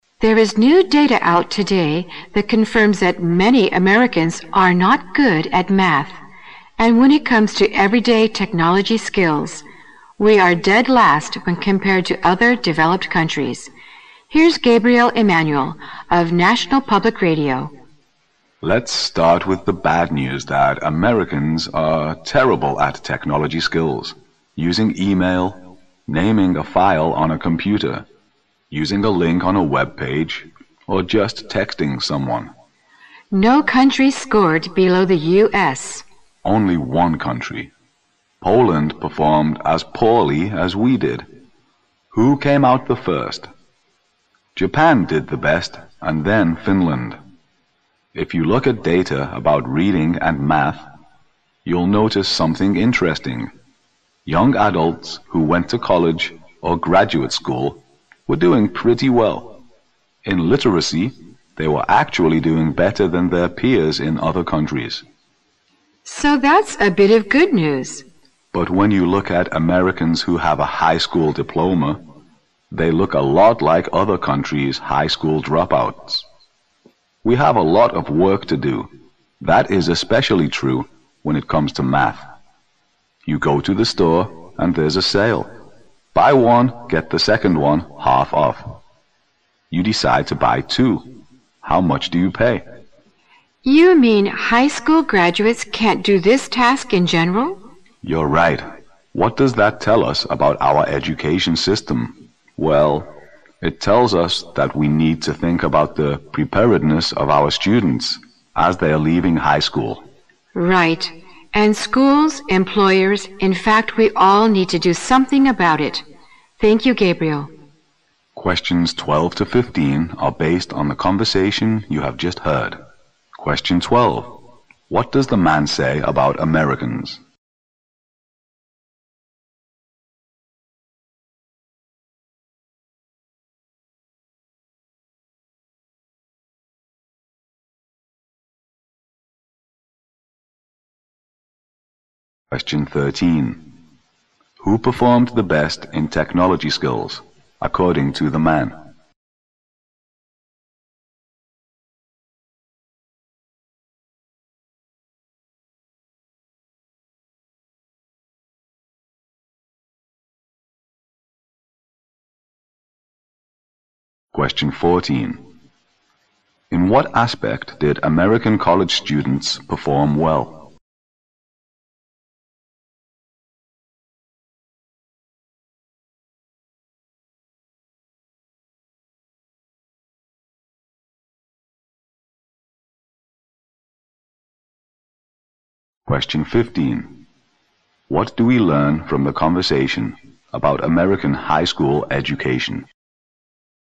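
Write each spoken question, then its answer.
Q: What does the man say about Americans?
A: They are poor at technology skills and math.

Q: Who performed the best in technology skills, according to the man?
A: Japan

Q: In what aspect did American college students perform well?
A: Literacy

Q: What do we learn from the conversation about American high school education?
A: It doesn't prepare students well; its graduates are like other countries' dropouts.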